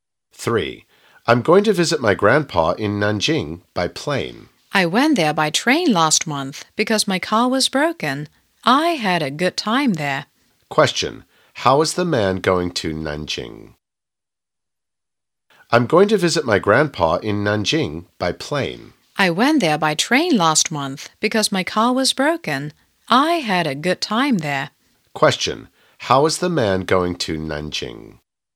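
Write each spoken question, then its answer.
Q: Question, how is the man going to Nanjing?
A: By plane.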